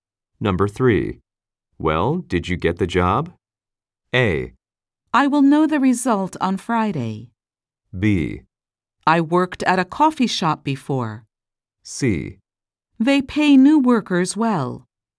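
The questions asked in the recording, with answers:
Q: Well, did you get the job?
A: A: I will know the result on Friday.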